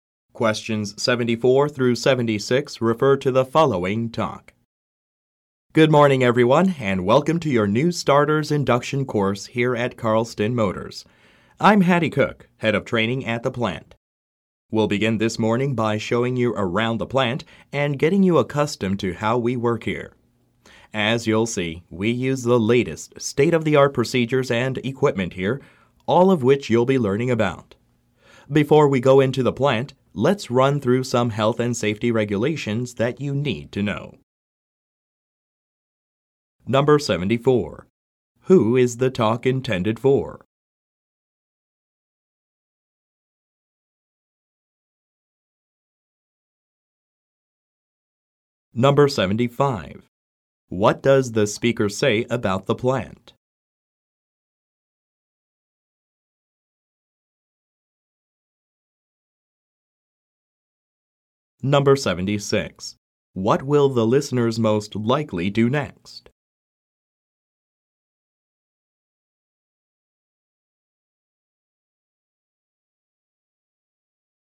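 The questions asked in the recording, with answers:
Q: Who is the talk intended for?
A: New employees starting at Carlston Motors

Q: What does the speaker say about the plant?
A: It uses the latest state-of-the-art procedures and equipment

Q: What will the listeners most likely do next?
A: Go over health and safety regulations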